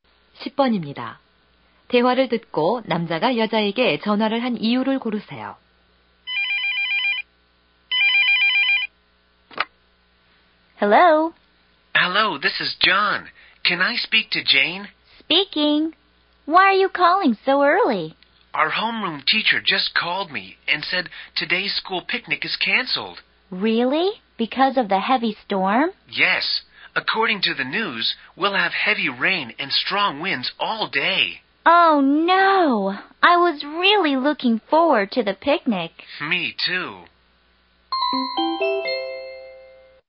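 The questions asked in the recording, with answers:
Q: 대화를 듣고 남자가 여자에게 전화를 한 이유를 고르세요.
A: 소풍 취소를 알리려고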